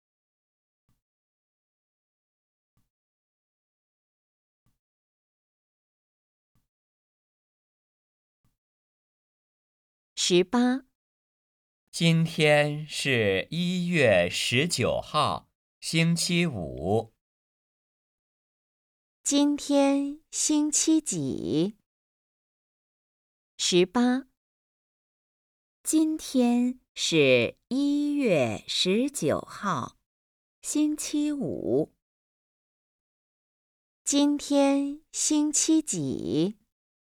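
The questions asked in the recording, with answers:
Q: 今天星期几?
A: 星期五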